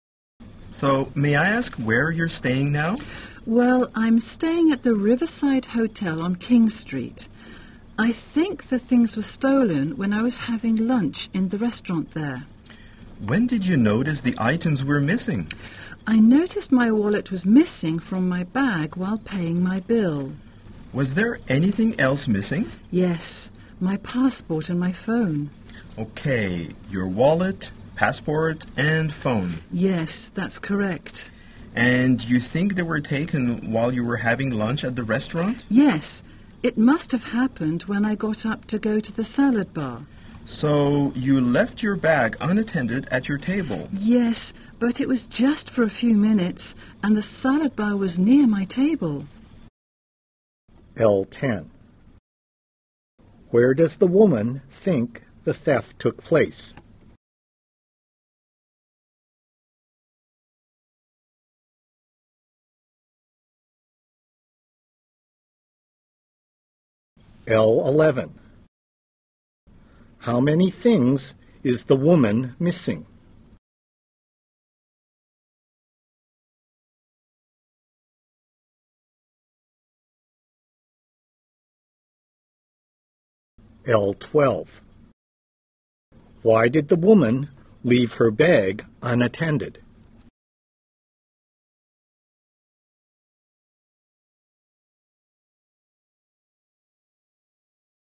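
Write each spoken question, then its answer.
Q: Where does the woman think the theft took place?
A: In the restaurant at the Riverside Hotel

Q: How many things is the woman missing?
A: Three

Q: Why did the woman leave her bag unattended?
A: She went to the salad bar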